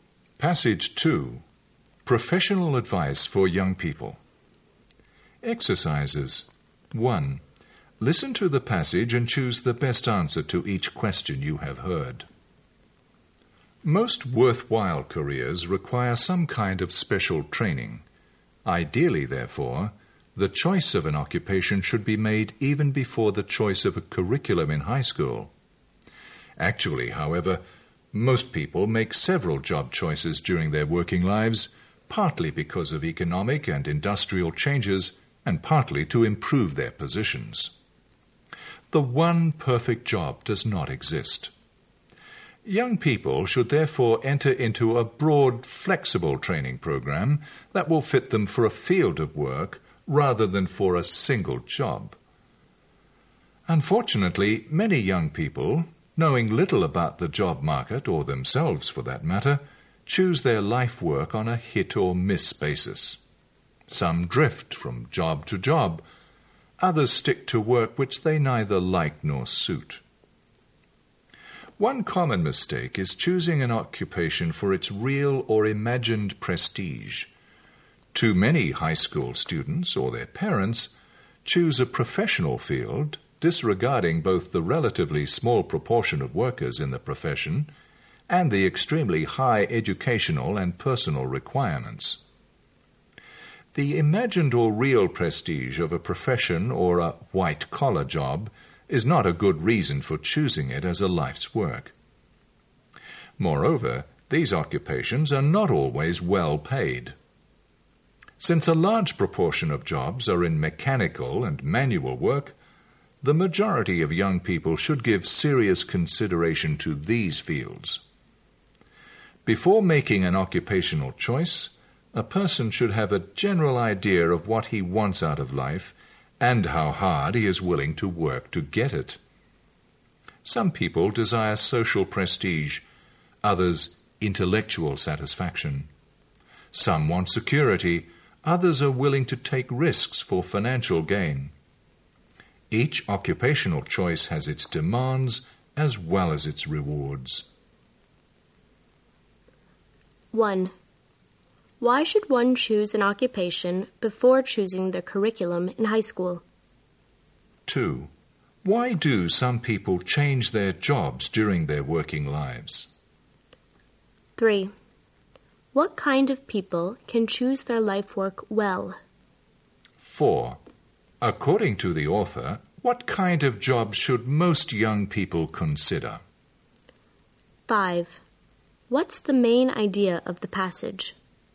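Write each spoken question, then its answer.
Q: Why should one choose an occupation before choosing the curriculum in high school?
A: Because most worthwhile careers require special training

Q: Why do some people change their jobs during their working lives?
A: Because of economic and industrial changes and to improve their positions

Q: According to the author, what kind of job should most young people consider?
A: Mechanical and manual work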